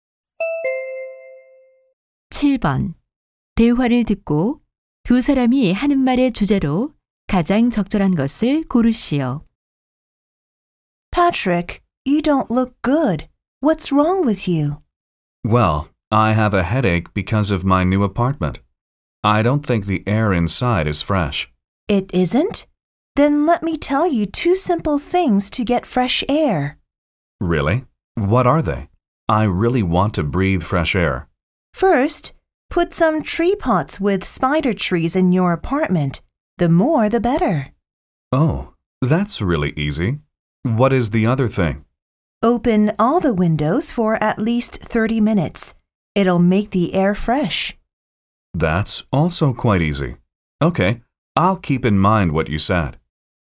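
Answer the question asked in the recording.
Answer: 실내 공기를 신선하게 하는 방법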